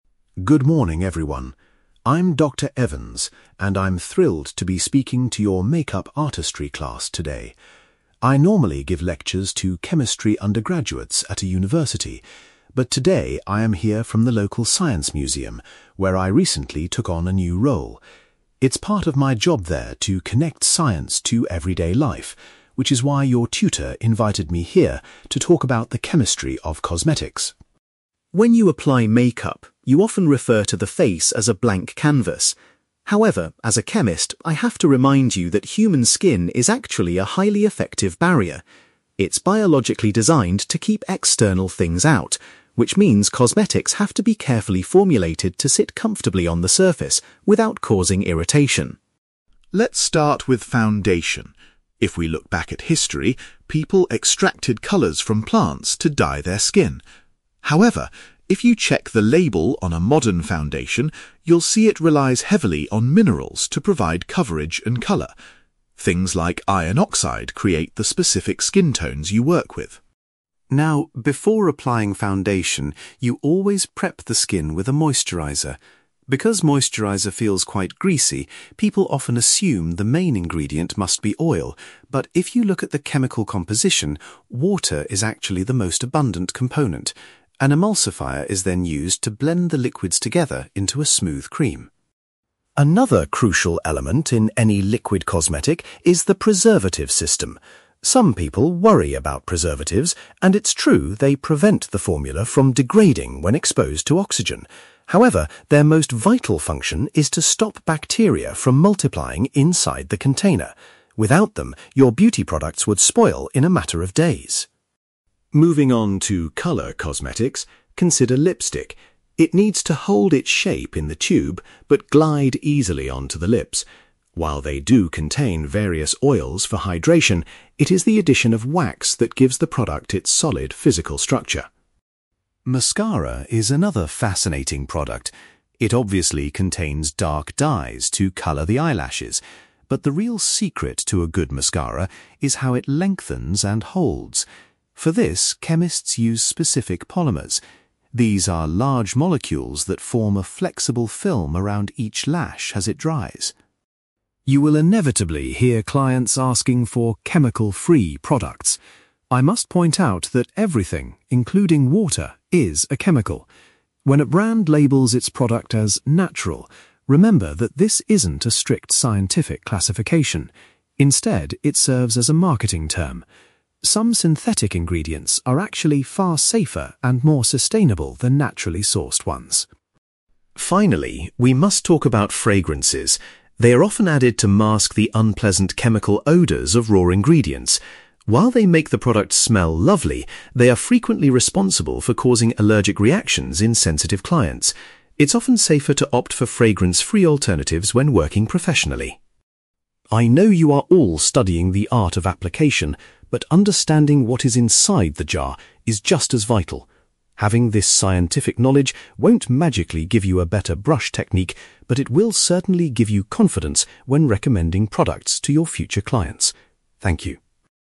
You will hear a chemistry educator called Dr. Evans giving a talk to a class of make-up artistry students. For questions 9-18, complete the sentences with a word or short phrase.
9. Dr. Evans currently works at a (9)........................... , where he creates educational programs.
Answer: science museum

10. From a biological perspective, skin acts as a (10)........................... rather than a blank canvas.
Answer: barrier

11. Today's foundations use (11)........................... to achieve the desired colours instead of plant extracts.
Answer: minerals

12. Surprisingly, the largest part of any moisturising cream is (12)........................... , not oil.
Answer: water

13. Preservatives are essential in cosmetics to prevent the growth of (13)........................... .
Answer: bacteria

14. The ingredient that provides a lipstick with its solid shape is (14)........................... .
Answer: wax

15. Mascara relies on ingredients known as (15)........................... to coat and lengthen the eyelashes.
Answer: polymers

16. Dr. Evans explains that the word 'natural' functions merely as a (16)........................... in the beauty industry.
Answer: marketing term

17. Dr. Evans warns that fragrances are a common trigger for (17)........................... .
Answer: allergic reactions

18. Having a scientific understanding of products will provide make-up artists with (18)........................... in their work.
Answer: confidence

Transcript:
Dr. Evans: Good morning, everyone. I'm Dr. Evans, and I'm thrilled to be speaking to your make-up artistry class today. I normally give lectures to chemistry undergraduates at a university, but today I am here from the local science museum, where I recently took on a new role. It's part of my job there to connect science to everyday life, which is why your tutor invited me here to talk about the chemistry of cosmetics.
When you apply make-up, you often refer to the face as a blank canvas. However, as a chemist, I have to remind you that human skin is actually a highly effective barrier. It's biologically designed to keep external things out, which means cosmetics have to be carefully formulated to sit comfortably on the surface without causing irritation.
Let's start with foundation. If we look back at history, people extracted colours from plants to dye their skin. However, if you check the label on a modern foundation, you'll see it relies heavily on minerals to provide coverage and colour. Things like iron oxide create the specific skin tones you work with.
Now, before applying foundation, you always prep the skin with a moisturiser. Because moisturiser feels quite greasy, people often assume the main ingredient must be oil. But if you look at the chemical composition, water is actually the most abundant component. An emulsifier is then used to blend the liquids together into a smooth cream.
Another crucial element in any liquid cosmetic is the preservative system. Some people worry about preservatives, and it's true they prevent the formula from degrading when exposed to oxygen. However, their most vital function is to stop bacteria from multiplying inside the container. Without them, your beauty products would spoil in a matter of days.
Moving on to colour cosmetics, consider lipstick. It needs to hold its shape in the tube but glide easily onto the lips. While they do contain various oils for hydration, it is the addition of wax that gives the product its solid physical structure.
Mascara is another fascinating product. It obviously contains dark dyes to colour the eyelashes, but the real secret to a good mascara is how it lengthens and holds. For this, chemists use specific polymers. These are large molecules that form a flexible film around each lash as it dries.
You will inevitably hear clients asking for 'chemical-free' products. I must point out that everything, including water, is a chemical! When a brand labels its product as 'natural', remember that this isn't a strict scientific classification. Instead, it serves as a marketing term. Some synthetic ingredients are actually far safer and more sustainable than naturally sourced ones.
Finally, we must talk about fragrances. They are often added to mask the unpleasant chemical odours of raw ingredients. While they make the product smell lovely, they are frequently responsible for causing allergic reactions in sensitive clients. It's often safer to opt for fragrance-free alternatives when working professionally.
I know you are all studying the art of application, but understanding what is inside the jar is just as vital. Having this scientific knowledge won't magically give you a better brush technique, but it will certainly give you confidence when recommending products to your future clients. Thank you.

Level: B2